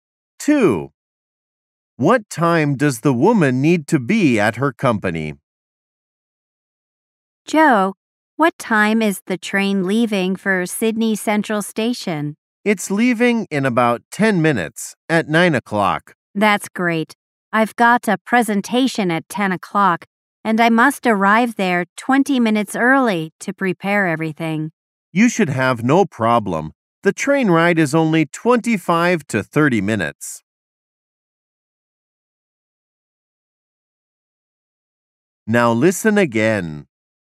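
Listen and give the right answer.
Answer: 9:40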